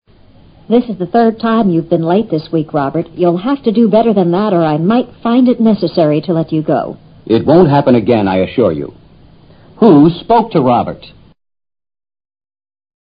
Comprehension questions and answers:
Who spoke to Robert?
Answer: His boss.